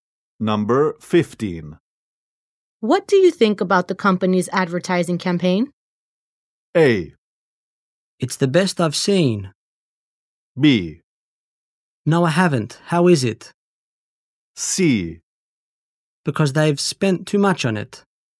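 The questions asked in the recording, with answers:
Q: What do you think about the company's advertising campaign?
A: A: It's the best I've seen.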